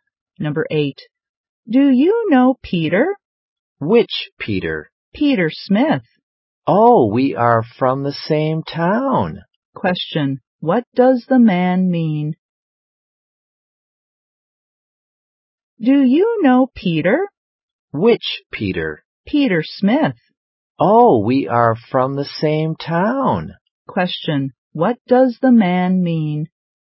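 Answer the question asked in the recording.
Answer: He knows Peter; they are from the same town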